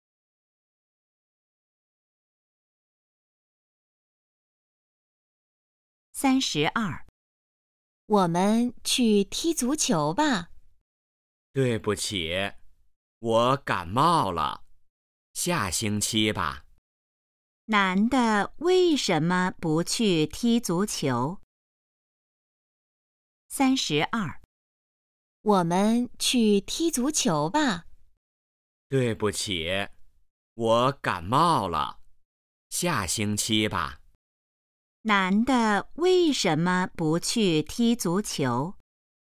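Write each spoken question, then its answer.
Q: 男的为什么不去踢足球?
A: 他感冒了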